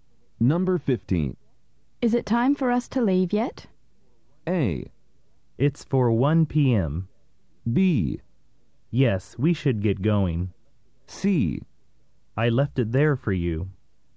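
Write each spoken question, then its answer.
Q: Is it time for us to leave yet?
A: B: Yes, we should get going.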